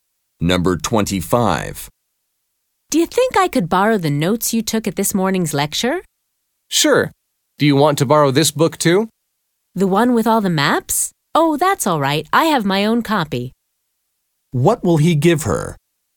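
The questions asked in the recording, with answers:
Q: What will he give her?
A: His lecture notes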